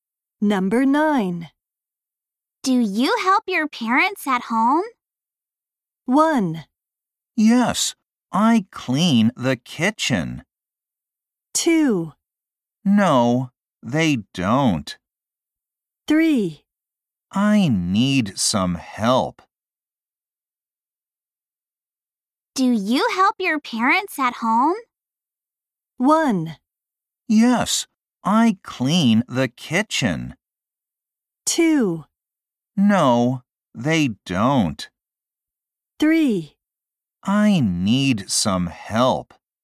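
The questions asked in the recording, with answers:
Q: Do you help your parents at home?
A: 1: Yes, I clean the kitchen.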